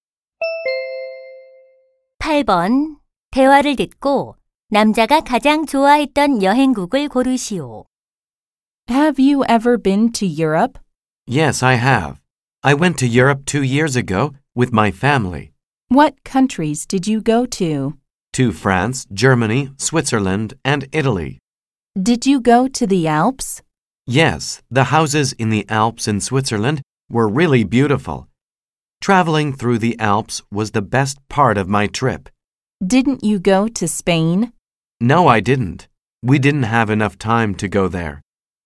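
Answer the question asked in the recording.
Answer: 스위스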